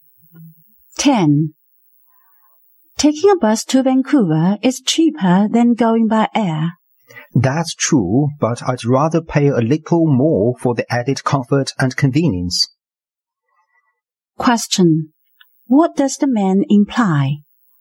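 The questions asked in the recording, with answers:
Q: What does the man imply?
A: He prefers to fly, for comfort and convenience.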